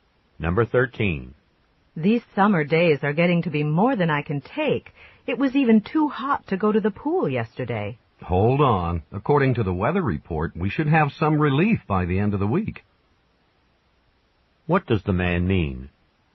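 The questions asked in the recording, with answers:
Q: What does the man mean?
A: It should be cooler by the end of the week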